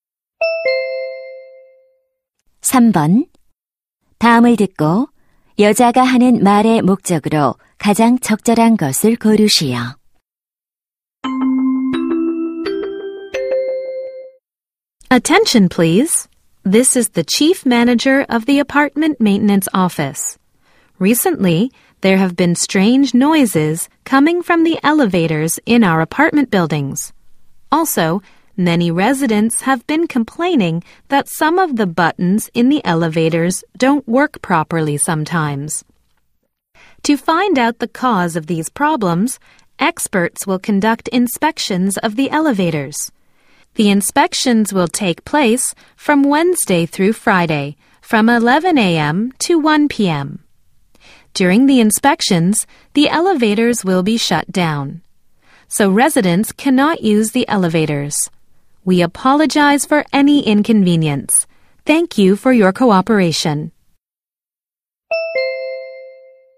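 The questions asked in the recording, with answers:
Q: 다음을 듣고 여자가 하는 말의 목적으로 가장 적절한 것을 고르시오.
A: 엘리베이터 점검 일정과 운행 중단을 안내하려고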